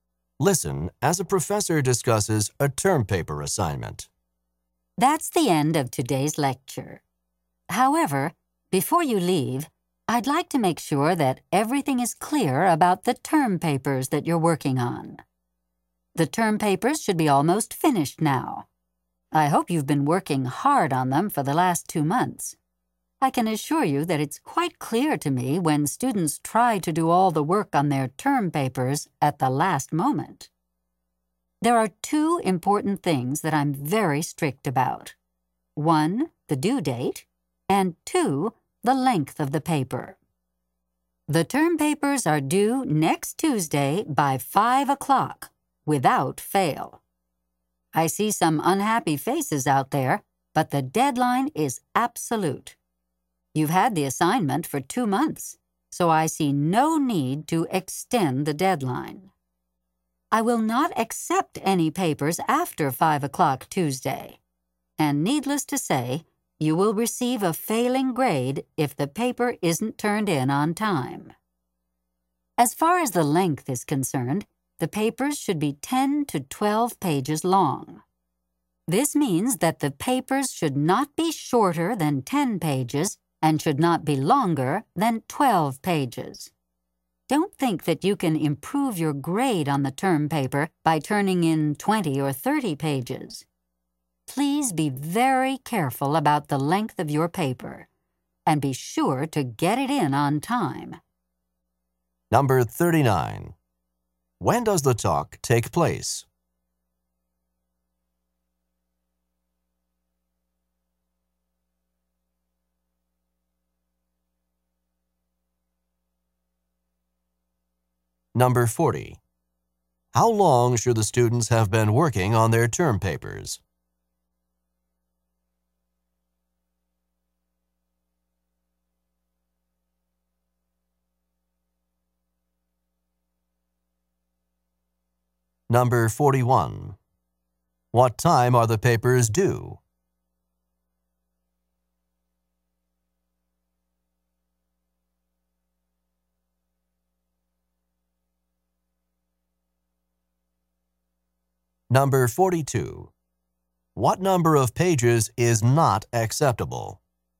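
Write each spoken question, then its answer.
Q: When does the talk take place?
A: At the end of a lecture

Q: How long should the students have been working on their term papers?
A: For two months

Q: What time are the papers due?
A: By 5 o'clock next Tuesday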